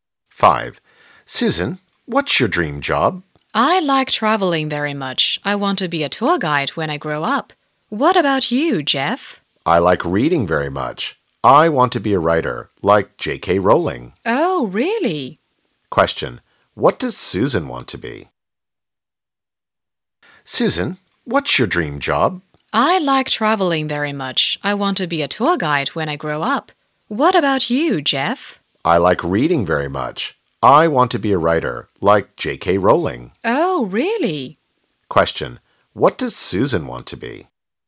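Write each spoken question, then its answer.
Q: What does Susan want to be?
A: A tour guide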